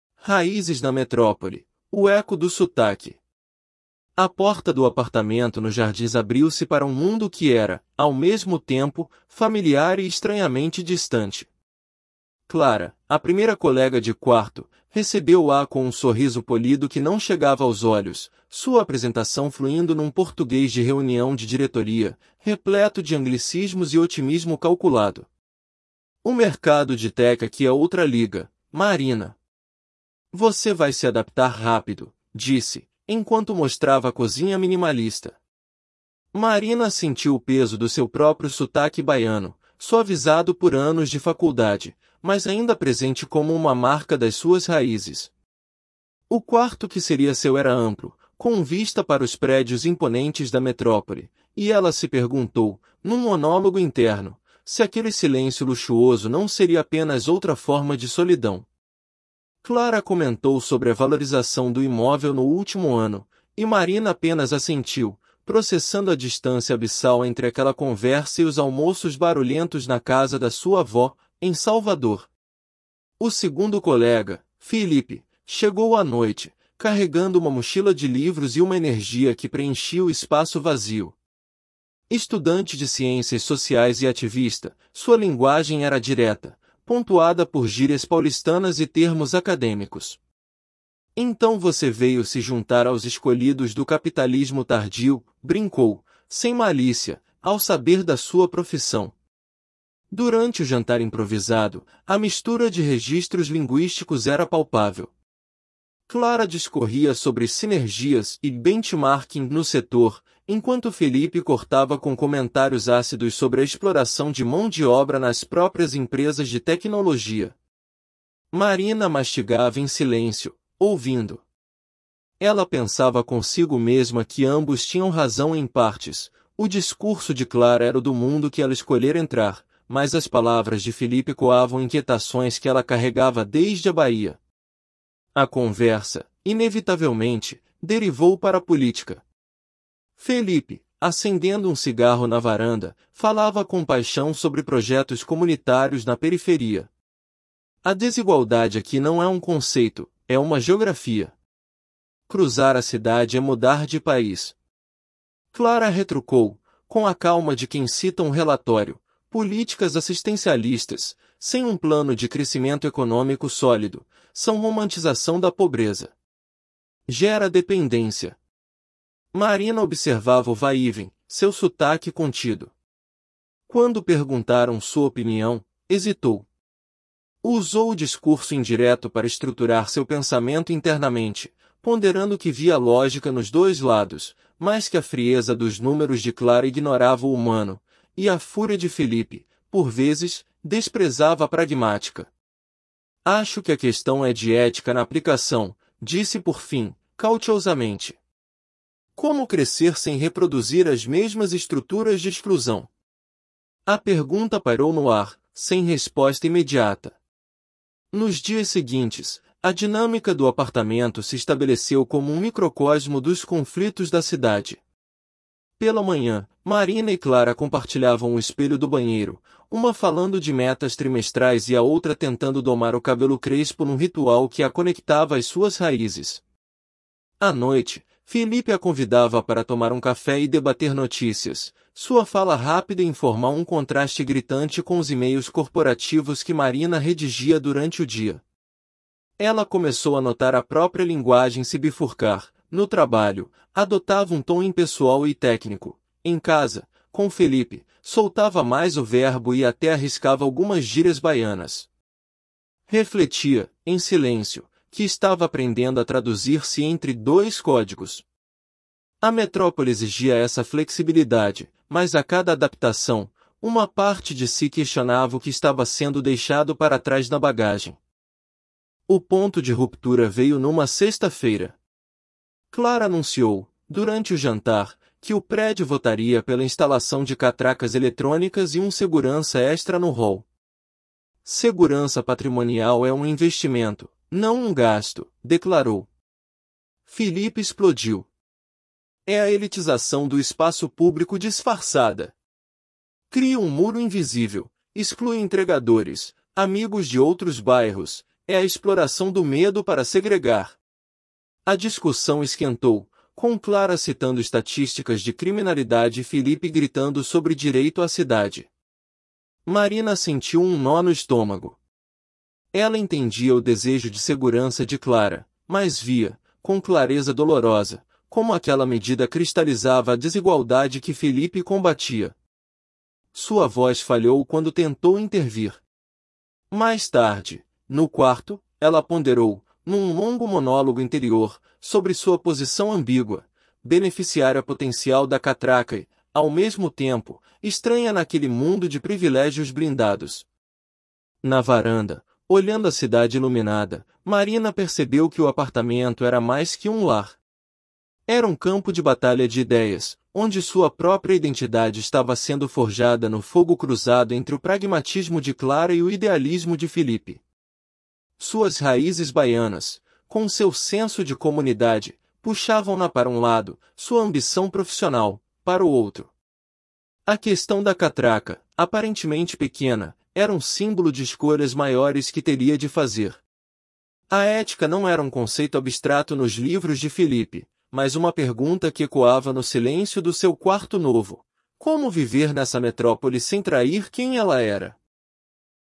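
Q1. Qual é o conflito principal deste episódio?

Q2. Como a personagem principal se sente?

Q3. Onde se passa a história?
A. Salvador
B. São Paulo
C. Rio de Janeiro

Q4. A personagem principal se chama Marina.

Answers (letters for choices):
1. O choque de classes e ideias políticas entre os colegas de quarto (Clara e Felipe), que deixa Marina dividida entre a ambição profissional e as suas raízes baianas
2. Dividida e deslocada, com uma posição ambígua entre dois mundos
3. B
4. Verdadeiro

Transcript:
Raízes na Metrópole: O Eco do Sotaque – TEST
A porta do apartamento no Jardins abriu-se para um mundo que era, ao mesmo tempo, familiar e estranhamente distante. Clara, a primeira colega de quarto, recebeu-a com um sorriso polido que não chegava aos olhos, sua apresentação fluindo num português de reunião de diretoria, repleto de anglicismos e otimismo calculado. 'O mercado de tech aqui é outra liga, Marina. 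Você vai se adaptar rápido', disse, enquanto mostrava a cozinha minimalista. Marina sentiu o peso do seu próprio sotaque baiano, suavizado por anos de faculdade, mas ainda presente como uma marca das suas raízes. O quarto que seria seu era amplo, com vista para os prédios imponentes da metrópole, e ela se perguntou, num monólogo interno, se aquele silêncio luxuoso não seria apenas outra forma de solidão. Clara comentou sobre a valorização do imóvel no último ano, e Marina apenas assentiu, processando a distância abissal entre aquela conversa e os almoços barulhentos na casa da sua avó, em Salvador.
O segundo colega, Felipe, chegou à noite, carregando uma mochila de livros e uma energia que preenchia o espaço vazio. Estudante de ciências sociais e ativista, sua linguagem era direta, pontuada por gírias paulistanas e termos acadêmicos. 'Então você veio se juntar aos escolhidos do capitalismo tardio?', brincou, sem malícia, ao saber da sua profissão. 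Durante o jantar improvisado, a mistura de registros linguísticos era palpável. Clara discorria sobre 'sinergias' e 'benchmarking' no setor, enquanto Felipe cortava com comentários ácidos sobre a exploração de mão de obra nas próprias empresas de tecnologia. Marina mastigava em silêncio, ouvindo. Ela pensava consigo mesma que ambos tinham razão em partes; o discurso de Clara era o do mundo que ela escolhera entrar, mas as palavras de Felipe ecoavam inquietações que ela carregava desde a Bahia.
A conversa, inevitavelmente, derivou para política. Felipe, acendendo um cigarro na varanda, falava com paixão sobre projetos comunitários na periferia. 'A desigualdade aqui não é um conceito, é uma geografia. Cruzar a cidade é mudar de país.' Clara retrucou, com a calma de quem cita um relatório: 'Políticas assistencialistas, sem um plano de crescimento econômico sólido, são romantização da pobreza. 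Gera dependência.' Marina observava o vai-e-vem, seu sotaque contido. Quando perguntaram sua opinião, hesitou. Usou o discurso indireto para estruturar seu pensamento internamente, ponderando que via lógica nos dois lados, mas que a frieza dos números de Clara ignorava o humano, e a fúria de Felipe, por vezes, desprezava a pragmática. 'Acho que a questão é de ética na aplicação', disse por fim, cautiousamente. 'Como crescer sem reproduzir as mesmas estruturas de exclusão?' A pergunta pairou no ar, sem resposta imediata.
Nos dias seguintes, a dinâmica do apartamento se estabeleceu como um microcosmo dos conflitos da cidade. Pela manhã, Marina e Clara compartilhavam o espelho do banheiro, uma falando de metas trimestrais e a outra tentando domar o cabelo crespo num ritual que a conectava às suas raízes. À noite, Felipe a convidava para tomar um café e debater notícias, sua fala rápida e informal um contraste gritante com os e-mails corporativos que Marina redigia durante o dia. 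Ela começou a notar a própria linguagem se bifurcar: no trabalho, adotava um tom impessoal e técnico; em casa, com Felipe, soltava mais o verbo e até arriscava algumas gírias baianas. Refletia, em silêncio, que estava aprendendo a traduzir-se entre dois códigos. A metrópole exigia essa flexibilidade, mas a cada adaptação, uma parte de si questionava o que estava sendo deixado para trás na bagagem.
O ponto de ruptura veio numa sexta-feira. Clara anunciou, durante o jantar, que o prédio votaria pela instalação de catracas eletrônicas e um segurança extra no hall. 'Segurança patrimonial é um investimento, não um gasto', declarou. Felipe explodiu. 'É a elitização do espaço público disfarçada! Cria um muro invisível, exclui entregadores, amigos de outros bairros... é a exploração do medo para segregar!' A discussão esquentou, com Clara citando estatísticas de criminalidade e Felipe gritando sobre direito à cidade. 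Marina sentiu um nó no estômago. Ela entendia o desejo de segurança de Clara, mas via, com clareza dolorosa, como aquela medida cristalizava a desigualdade que Felipe combatia. Sua voz falhou quando tentou intervir. Mais tarde, no quarto, ela ponderou, num longo monólogo interior, sobre sua posição ambígua: beneficiária potencial da catraca e, ao mesmo tempo, estranha naquele mundo de privilégios blindados.
Na varanda, olhando a cidade iluminada, Marina percebeu que o apartamento era mais que um lar. Era um campo de batalha de ideias, onde sua própria identidade estava sendo forjada no fogo cruzado entre o pragmatismo de Clara e o idealismo de Felipe. Suas raízes baianas, com seu senso de comunidade, puxavam-na para um lado; sua ambição profissional, para o outro. A questão da catraca, aparentemente pequena, era um símbolo de escolhas maiores que teria de fazer. A ética não era um conceito abstrato nos livros de Felipe, mas uma pergunta que ecoava no silêncio do seu quarto novo: como viver nessa metrópole sem trair quem ela era?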